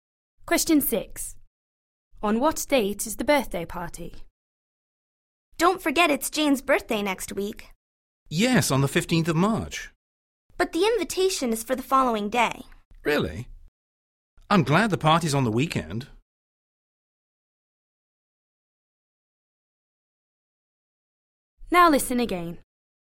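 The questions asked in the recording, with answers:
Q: On what date is the birthday party?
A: 16th March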